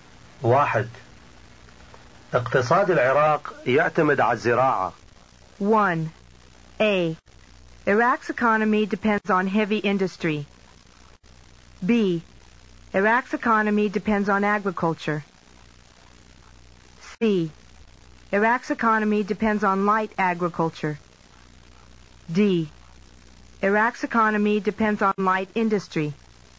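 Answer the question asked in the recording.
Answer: B: Iraq's economy depends on agriculture.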